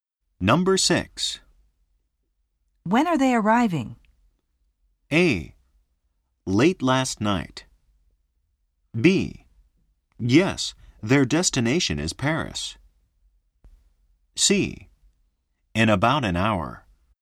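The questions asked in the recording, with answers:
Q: When are they arriving?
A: C: In about an hour.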